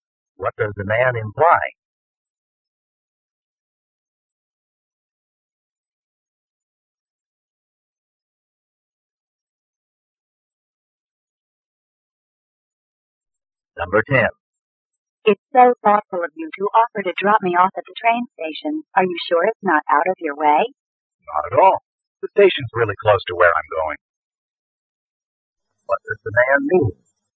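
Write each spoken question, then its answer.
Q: What does the man mean?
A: It's no trouble; the station is near where he's going.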